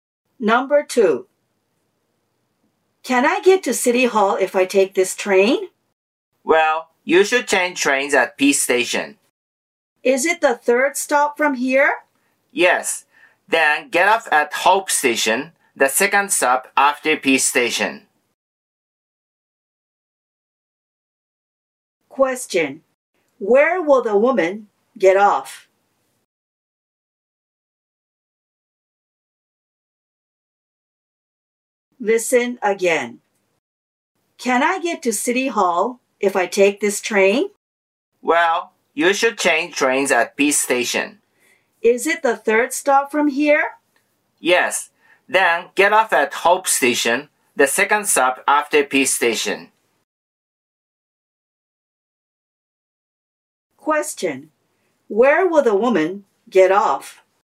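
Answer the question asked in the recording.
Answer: Hope Station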